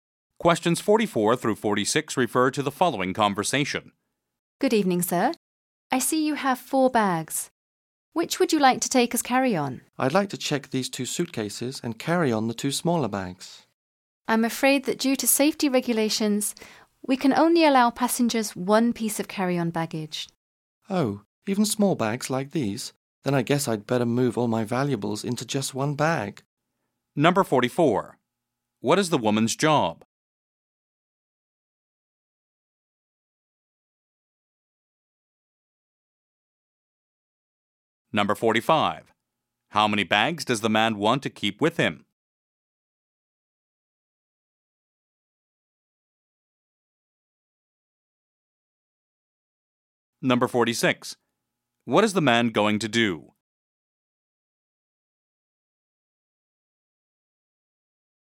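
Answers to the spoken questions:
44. Airline check-in agent
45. Two
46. Move his valuables into one bag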